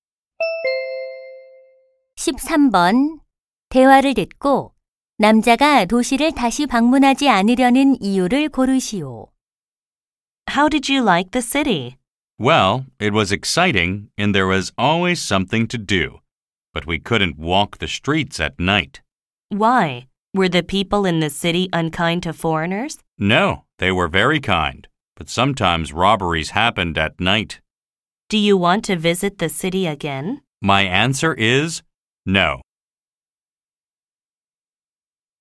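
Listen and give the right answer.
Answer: 밤에 강도 사건이 일어나서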